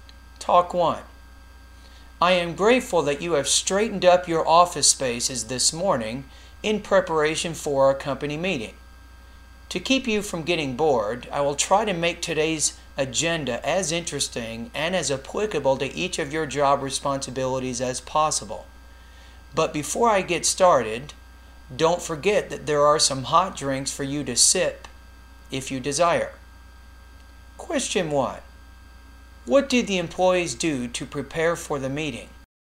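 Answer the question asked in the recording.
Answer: They straightened up their office spaces.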